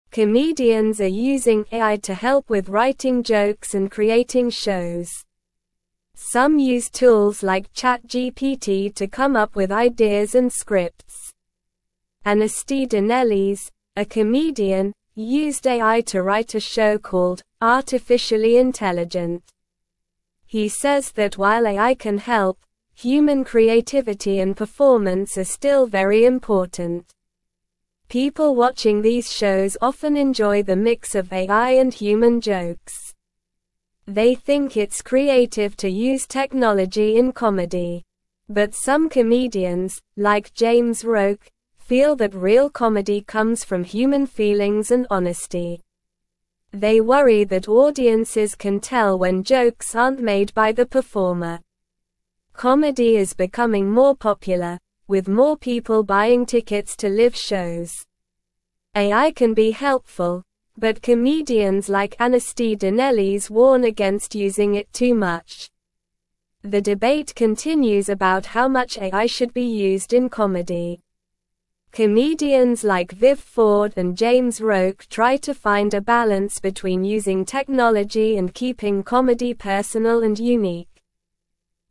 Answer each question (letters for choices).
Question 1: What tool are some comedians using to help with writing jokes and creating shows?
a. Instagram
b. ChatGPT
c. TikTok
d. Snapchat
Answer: b

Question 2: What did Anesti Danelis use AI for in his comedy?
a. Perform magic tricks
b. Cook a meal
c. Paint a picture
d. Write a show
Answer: d

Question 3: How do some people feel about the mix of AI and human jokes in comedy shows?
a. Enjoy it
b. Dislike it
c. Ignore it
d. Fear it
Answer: a

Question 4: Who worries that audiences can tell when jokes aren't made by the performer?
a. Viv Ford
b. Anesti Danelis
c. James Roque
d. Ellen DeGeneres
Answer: c

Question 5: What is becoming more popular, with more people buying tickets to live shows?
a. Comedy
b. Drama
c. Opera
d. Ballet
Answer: a

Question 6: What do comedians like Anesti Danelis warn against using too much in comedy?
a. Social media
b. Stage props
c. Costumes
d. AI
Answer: d

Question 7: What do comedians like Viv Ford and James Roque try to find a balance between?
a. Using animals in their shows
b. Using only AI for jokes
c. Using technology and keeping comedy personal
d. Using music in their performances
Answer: c

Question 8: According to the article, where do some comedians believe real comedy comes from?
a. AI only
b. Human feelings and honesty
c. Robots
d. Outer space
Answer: b

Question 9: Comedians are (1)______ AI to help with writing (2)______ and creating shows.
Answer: using

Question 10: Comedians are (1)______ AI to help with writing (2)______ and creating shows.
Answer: jokes

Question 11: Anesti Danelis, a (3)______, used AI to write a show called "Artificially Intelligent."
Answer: comedian

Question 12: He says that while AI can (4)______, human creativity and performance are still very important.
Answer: help

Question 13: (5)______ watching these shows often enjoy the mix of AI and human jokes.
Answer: People

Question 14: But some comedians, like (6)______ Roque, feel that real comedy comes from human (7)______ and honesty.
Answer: James

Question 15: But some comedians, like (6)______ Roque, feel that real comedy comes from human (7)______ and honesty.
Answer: feelings

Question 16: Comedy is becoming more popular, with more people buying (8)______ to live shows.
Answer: tickets

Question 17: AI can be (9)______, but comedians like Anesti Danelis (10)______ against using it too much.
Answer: helpful

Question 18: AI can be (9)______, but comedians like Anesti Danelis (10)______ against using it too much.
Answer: warn

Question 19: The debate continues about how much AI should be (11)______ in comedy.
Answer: used

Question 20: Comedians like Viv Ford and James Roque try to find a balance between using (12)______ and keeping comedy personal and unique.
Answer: technology

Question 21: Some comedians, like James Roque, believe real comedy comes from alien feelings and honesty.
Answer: False

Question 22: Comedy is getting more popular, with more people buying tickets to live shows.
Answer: True

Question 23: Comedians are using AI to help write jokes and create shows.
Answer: True

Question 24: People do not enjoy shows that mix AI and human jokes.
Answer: False

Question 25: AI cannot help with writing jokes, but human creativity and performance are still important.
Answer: False

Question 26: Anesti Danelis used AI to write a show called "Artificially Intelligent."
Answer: True

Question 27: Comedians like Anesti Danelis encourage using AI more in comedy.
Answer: False

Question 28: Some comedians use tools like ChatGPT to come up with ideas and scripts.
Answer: True

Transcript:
Comedians are using AI to help with writing jokes and creating shows. Some use tools like ChatGPT to come up with ideas and scripts. Anesti Danelis, a comedian, used AI to write a show called "Artificially Intelligent." He says that while AI can help, human creativity and performance are still very important.
People watching these shows often enjoy the mix of AI and human jokes. They think it's creative to use technology in comedy. But some comedians, like James Roque, feel that real comedy comes from human feelings and honesty. They worry that audiences can tell when jokes aren't made by the performer.
Comedy is becoming more popular, with more people buying tickets to live shows. AI can be helpful, but comedians like Anesti Danelis warn against using it too much. The debate continues about how much AI should be used in comedy. Comedians like Viv Ford and James Roque try to find a balance between using technology and keeping comedy personal and unique.

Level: Level 2